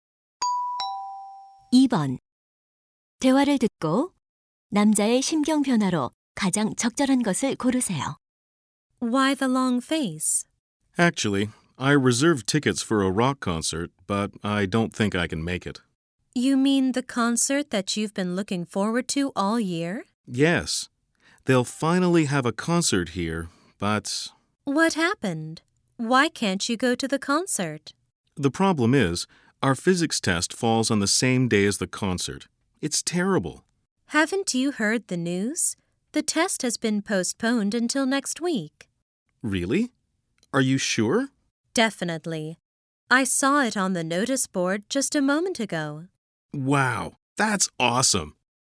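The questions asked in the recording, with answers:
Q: 대화를 듣고 남자의 심경 변화로 가장 적절한 것을 고르세요.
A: 실망한 상태에서 기쁜 상태로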